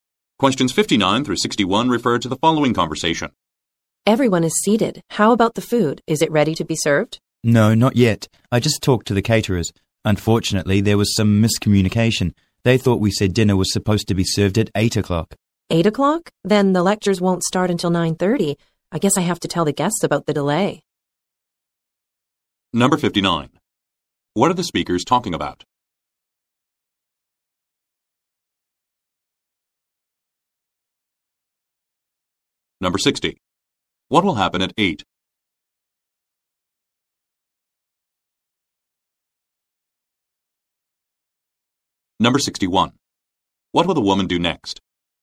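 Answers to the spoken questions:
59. A delay in serving the food (dinner)
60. Dinner will be served
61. Tell the guests about the delay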